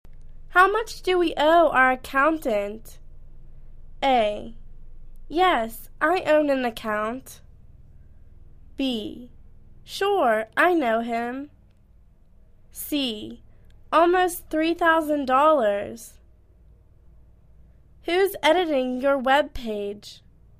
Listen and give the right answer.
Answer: Almost $3,000